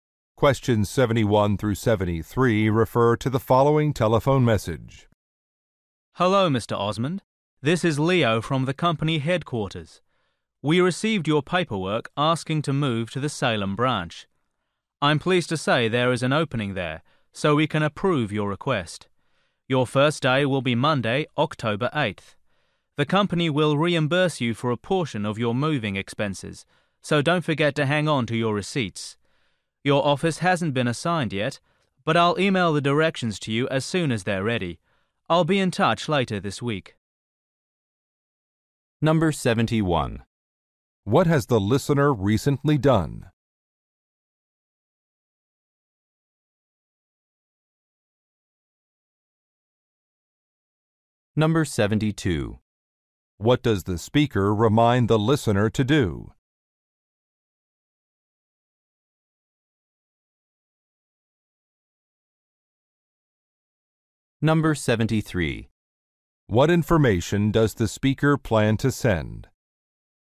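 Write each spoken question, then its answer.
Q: What has the listener recently done?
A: Requested a transfer to the Salem branch

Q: What does the speaker remind the listener to do?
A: Keep receipts

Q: What information does the speaker plan to send?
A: Directions to his office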